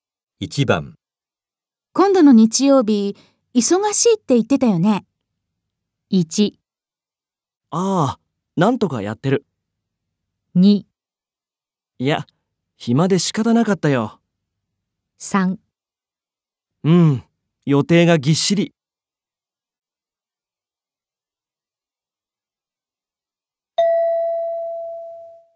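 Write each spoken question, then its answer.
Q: 今度の日曜日忙しいって言ってたよね。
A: 3: うん、予定がぎっしり。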